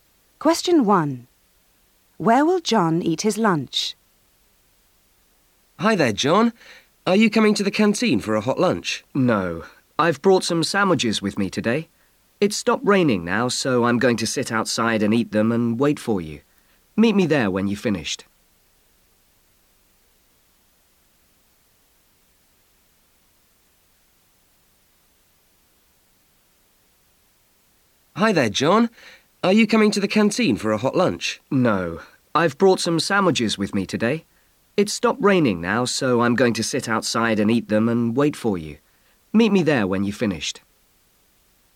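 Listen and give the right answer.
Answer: Outside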